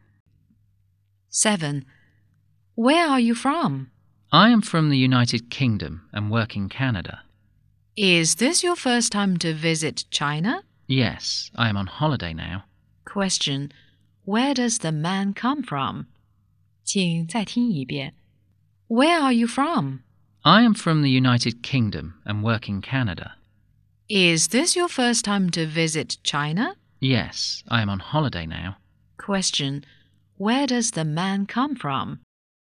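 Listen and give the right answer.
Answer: The United Kingdom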